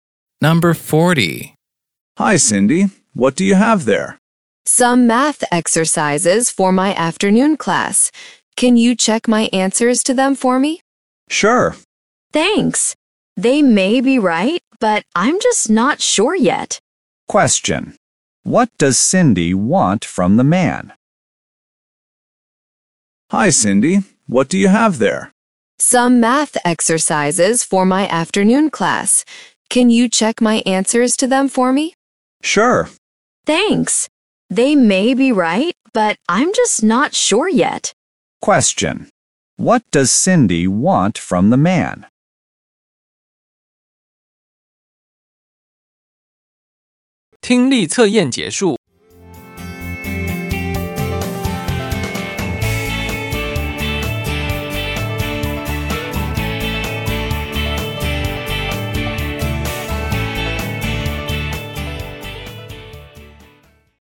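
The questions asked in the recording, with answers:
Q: What does Cindy want from the man?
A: She wants him to check her answers to her math exercises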